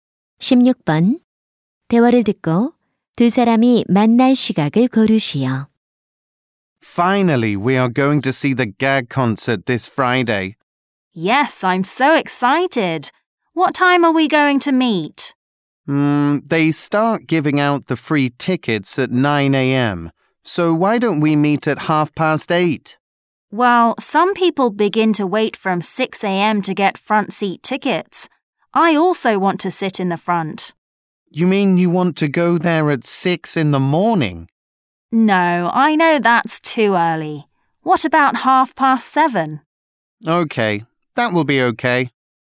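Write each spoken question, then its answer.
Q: 대화를 듣고 두 사람이 만날 시각을 고르시오.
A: 7시 30분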